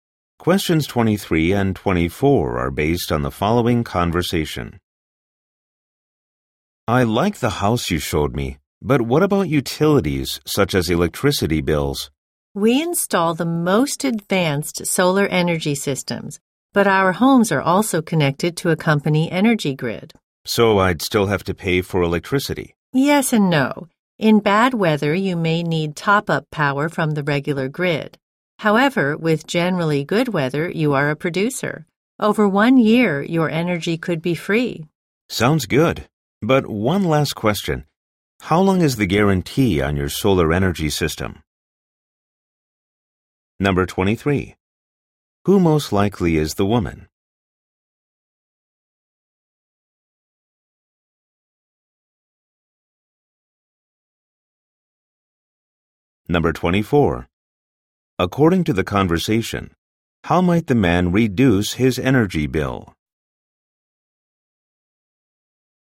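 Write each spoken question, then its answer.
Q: Who most likely is the woman?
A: A salesperson for solar-powered homes

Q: According to the conversation, how might the man reduce his energy bill?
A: By producing his own solar energy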